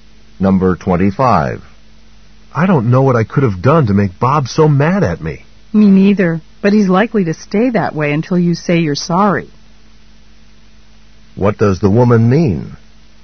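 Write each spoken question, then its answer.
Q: What does the woman mean?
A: The man should apologize to Bob.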